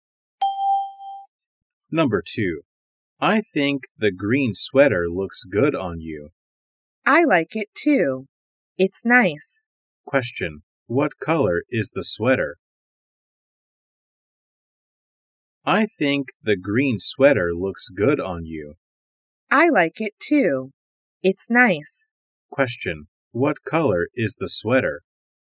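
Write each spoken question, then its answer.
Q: What color is the sweater?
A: Green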